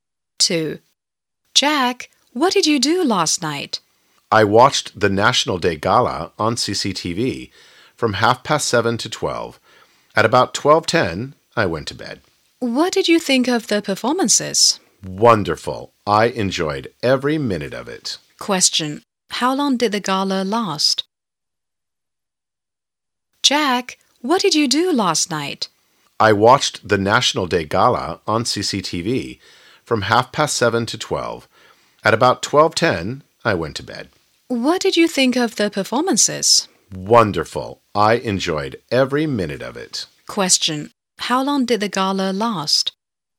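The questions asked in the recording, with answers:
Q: How long did the gala last?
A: Four and a half hours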